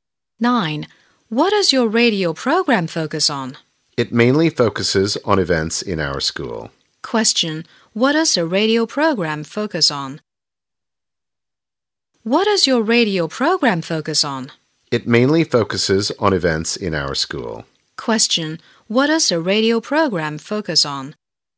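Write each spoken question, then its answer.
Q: What does the radio program focus on?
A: Events in their school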